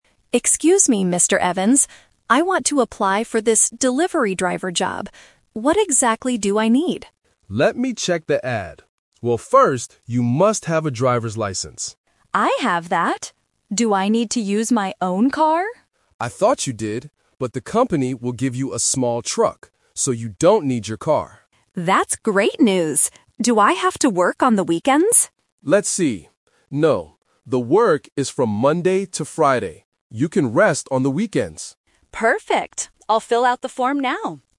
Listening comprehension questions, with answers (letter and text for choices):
Listen to the conversation at a job center. Circle the correct answer (A, B, or C).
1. What must Sarah have to get this job?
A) A small truck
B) A driver's license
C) Her own car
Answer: B) A driver's license

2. What vehicle will Sarah use for the deliveries?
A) Her own car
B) A small truck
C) A bus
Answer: B) A small truck

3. When does the delivery driver work?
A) On the weekends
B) Only on Monday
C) From Monday to Friday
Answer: C) From Monday to Friday

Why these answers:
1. Mr. Evans clearly says, "...first, you must have a driver's license." Option (A) is a trap because the company will give her a truck; she doesn't need to have one. Option (C) is a trap because she asks about her car, but she doesn't need to use it.
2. Mr. Evans says, "...the company will give you a small truck." Option (A) is the trap because Mr. Evans initially thought she needed her car ("I thought you did, but..."). Option (C) is a plausible vehicle for driving jobs but is not mentioned in the audio.
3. Mr. Evans reads the ad and says, "The work is from Monday to Friday." Option (A) is the trap because Sarah asks about the weekends, but Mr. Evans confirms she can "rest on the weekends." Option (B) is incomplete.

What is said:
Sarah: Excuse me, Mr. Evans. I want to apply for this delivery driver job. What exactly do I need?
Mr. Evans: Let me check the ad. Well, first, you must have a driver's license.
Sarah: I have that! Do I need to use my own car?
Mr. Evans: I thought you did, but the company will give you a small truck. So, you don't need your car.
Sarah: That's great news. Do I have to work on the weekends?
Mr. Evans: Let's see... No. The work is from Monday to Friday. You can rest on the weekends.

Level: A2